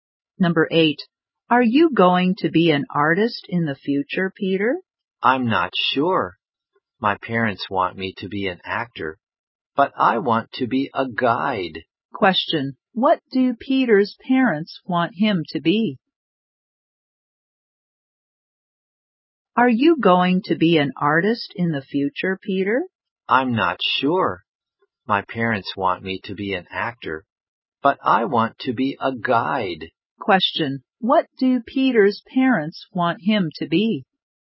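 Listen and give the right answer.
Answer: An actor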